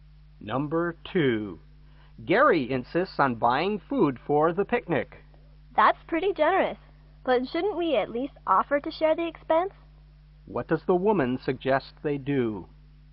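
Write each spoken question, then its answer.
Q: What does the woman suggest they do?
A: Offer to share the cost of the food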